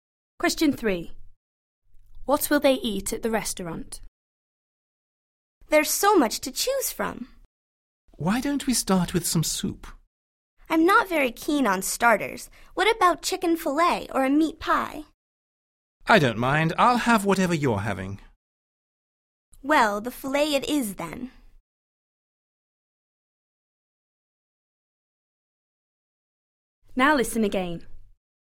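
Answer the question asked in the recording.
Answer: Chicken fillet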